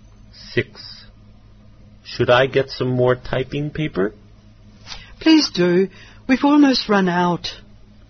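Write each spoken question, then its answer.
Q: What will the man do now?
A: Get some more typing paper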